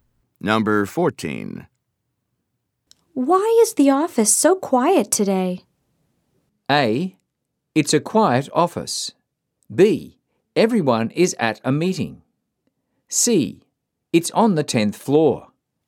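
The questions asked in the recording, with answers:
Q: Why is the office so quiet today?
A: B: Everyone is at a meeting.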